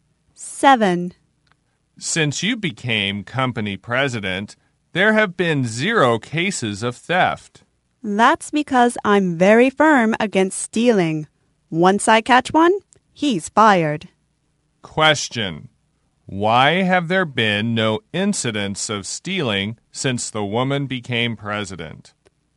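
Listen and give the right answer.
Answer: She is very firm against stealing and fires anyone caught.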